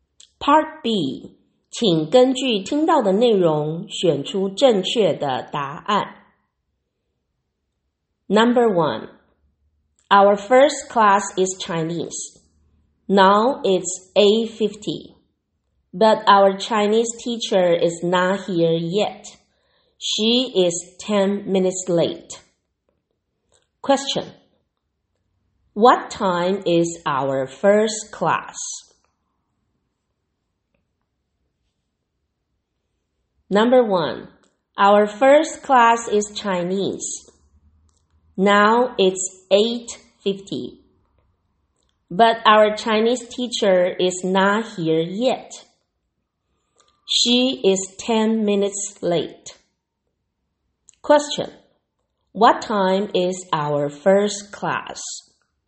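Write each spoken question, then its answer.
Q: what time is our first class?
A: 8:40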